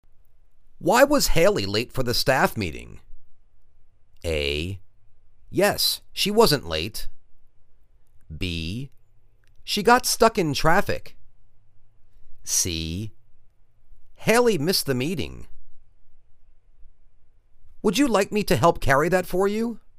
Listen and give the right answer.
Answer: She got stuck in traffic.